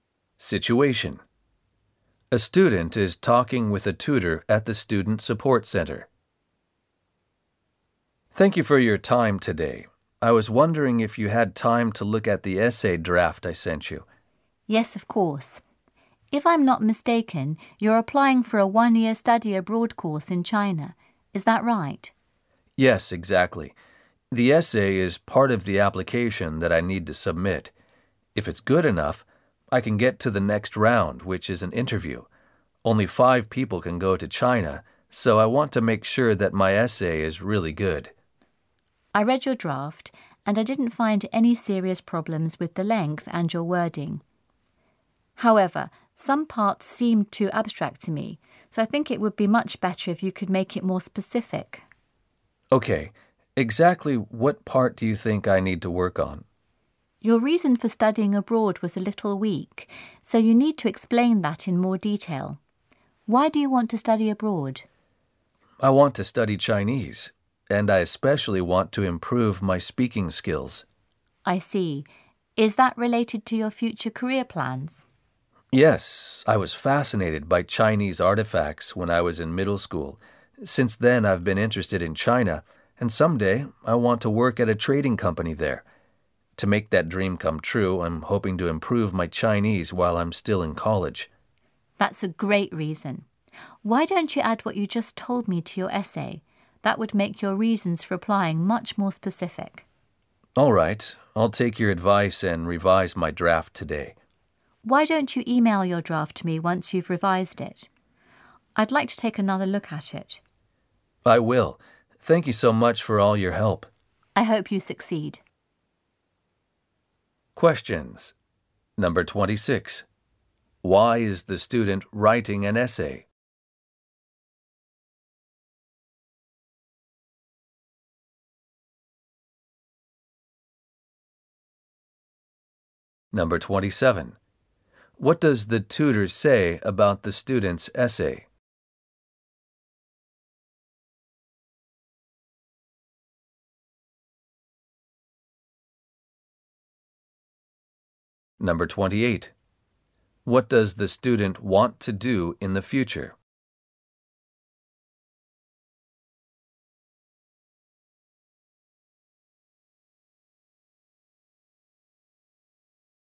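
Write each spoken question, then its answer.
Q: Why is the student writing an essay?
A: It is part of an application for a one-year study abroad course in China

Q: What does the tutor say about the student's essay?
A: Some parts are too abstract; the reason for studying abroad should be more specific

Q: What does the student want to do in the future?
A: Work at a trading company in China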